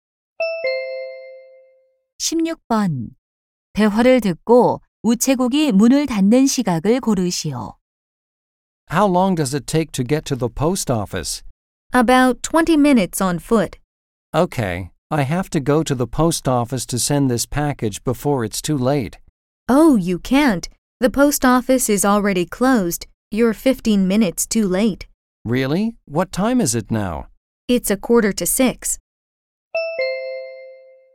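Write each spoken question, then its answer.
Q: 대화를 듣고 우체국이 문을 닫는 시각을 고르시오.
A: 6시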